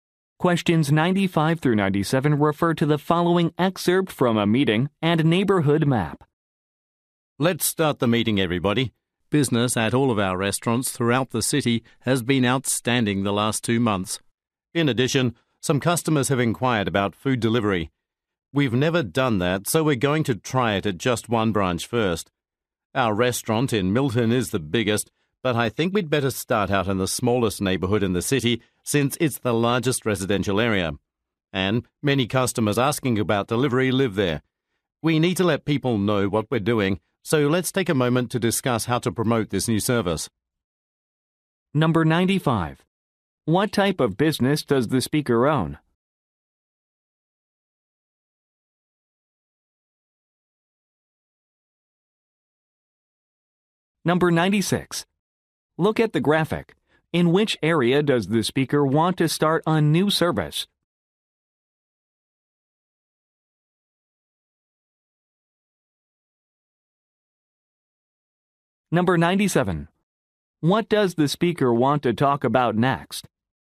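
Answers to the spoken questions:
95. Restaurants
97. How to promote the new delivery service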